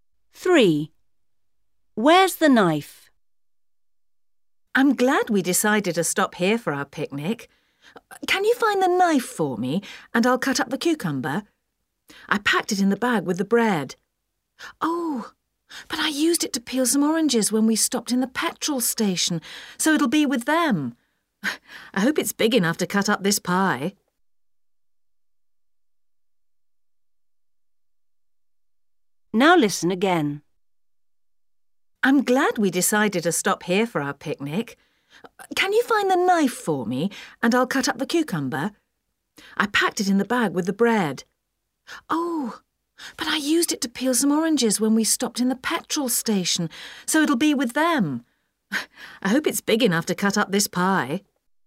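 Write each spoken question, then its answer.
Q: Where's the knife?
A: with the oranges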